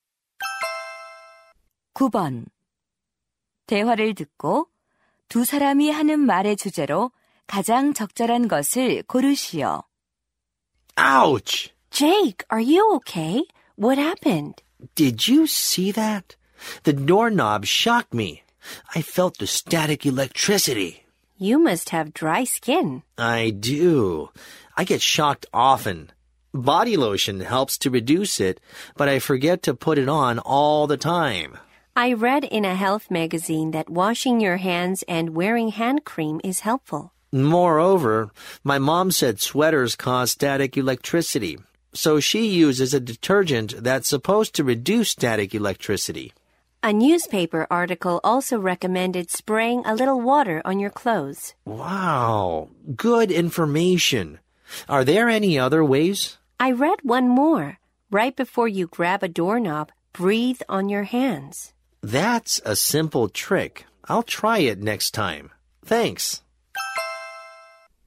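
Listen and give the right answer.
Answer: 정전기를 줄이는 방법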